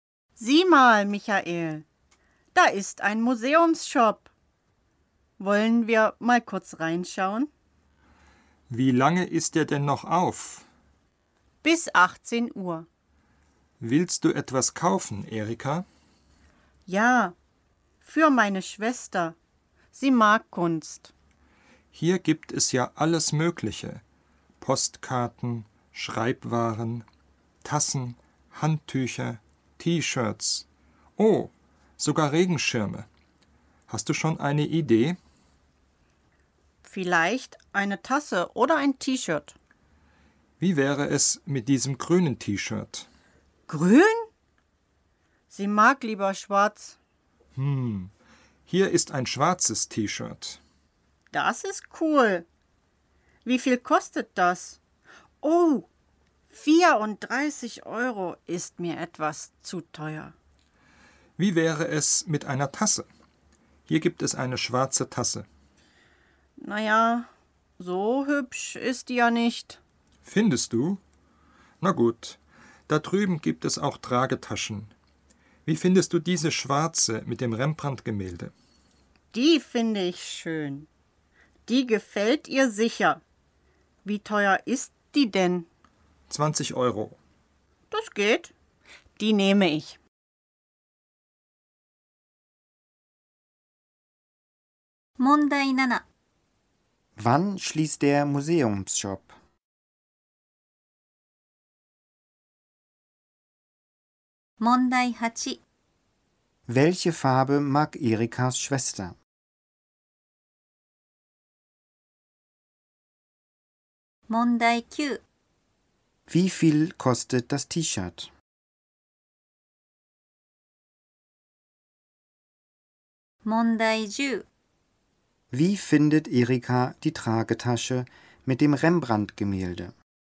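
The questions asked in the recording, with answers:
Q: Wann schließt der Museumsshop?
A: Um 18 Uhr

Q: Welche Farbe mag Erikas Schwester?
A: Schwarz

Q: Wie viel kostet das T-Shirt?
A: 34 Euro

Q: Wie findet Erika die Tragetasche mit dem Rembrandt-Gemälde?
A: Schön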